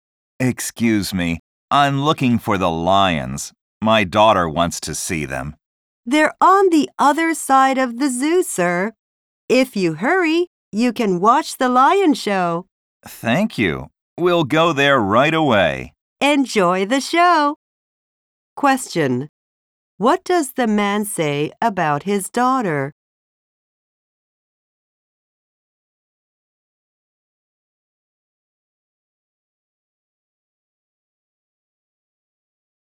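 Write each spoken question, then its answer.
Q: What does the man say about his daughter?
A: She wants to see the lions.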